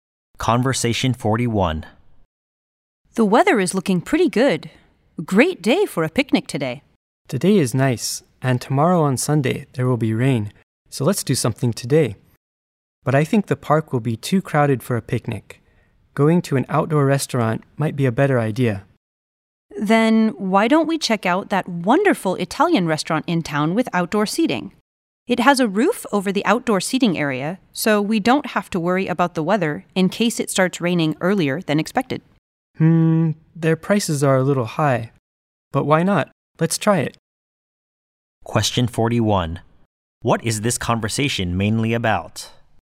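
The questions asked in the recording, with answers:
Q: What is this conversation mainly about?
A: Deciding what to do today (going to an outdoor Italian restaurant instead of a picnic)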